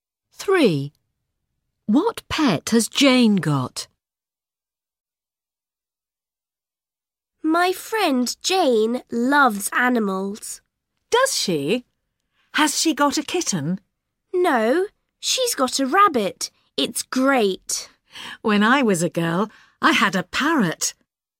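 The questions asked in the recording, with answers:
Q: What pet has Jane got?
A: a rabbit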